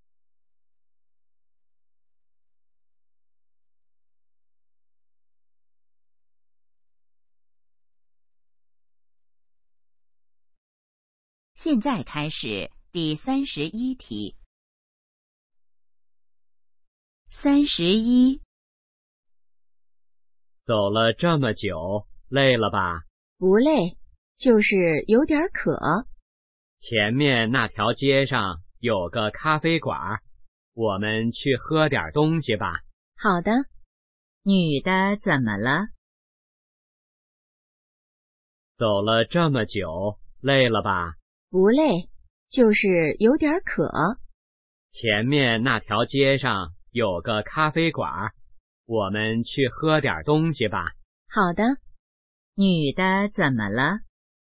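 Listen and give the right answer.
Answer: 渴了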